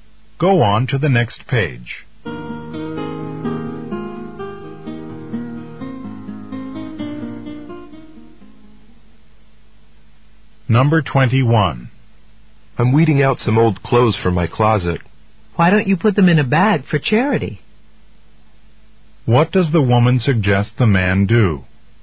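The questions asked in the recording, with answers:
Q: What does the woman suggest the man do?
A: Give the old clothes to charity.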